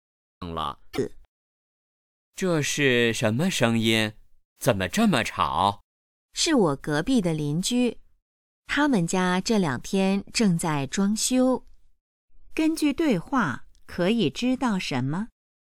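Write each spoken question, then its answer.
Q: 根据对话可以知道什么?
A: 邻居家正在装修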